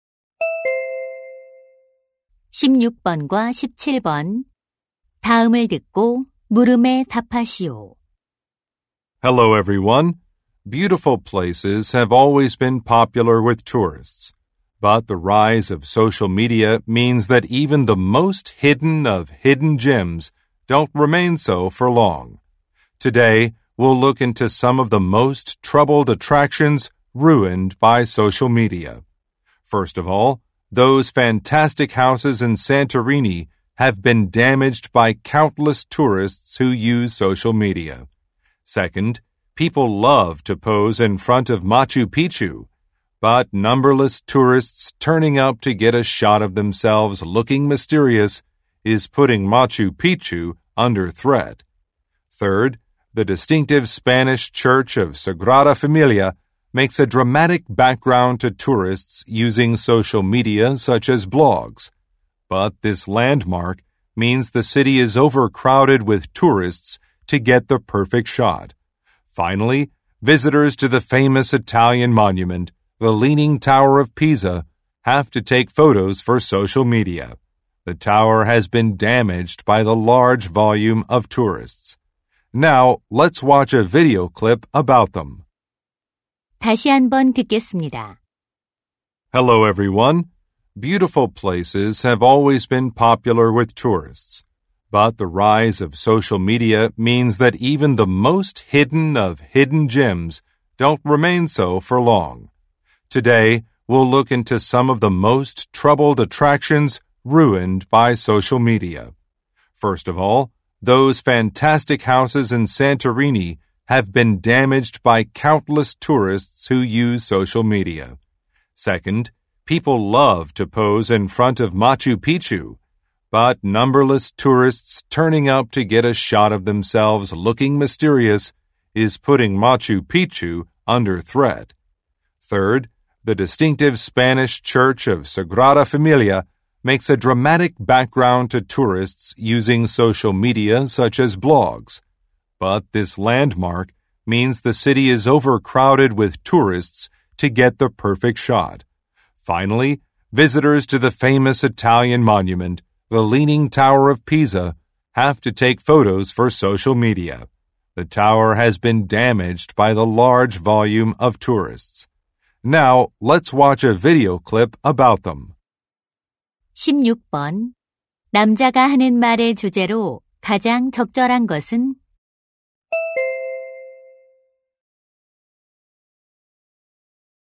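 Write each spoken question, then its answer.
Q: 남자가 하는 말의 주제로 가장 적절한 것은?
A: 소셜 미디어로 인해 훼손되는 관광 명소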